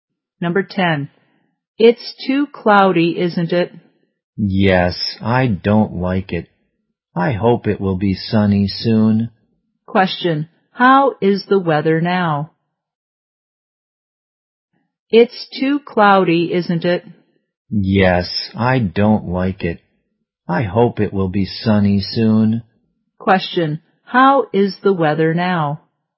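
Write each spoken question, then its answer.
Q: how is the weather now?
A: Cloudy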